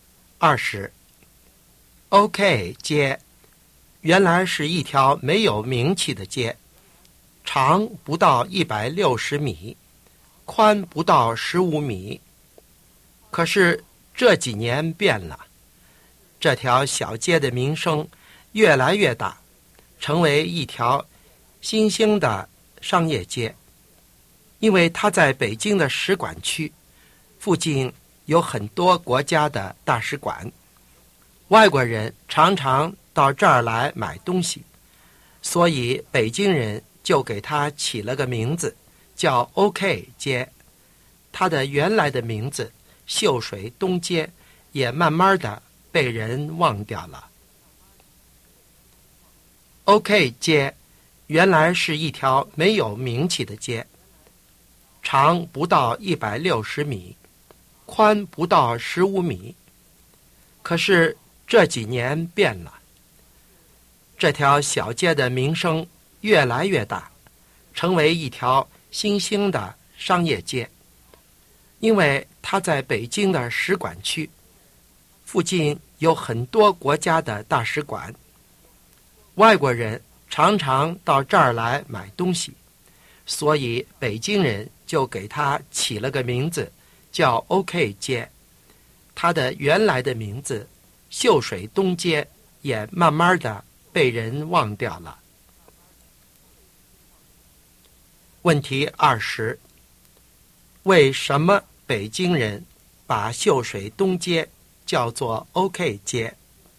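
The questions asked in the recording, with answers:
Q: 为什么北京人把秀水东街叫做 OK 街?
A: 它在使馆区附近,外国人常常到这儿来买东西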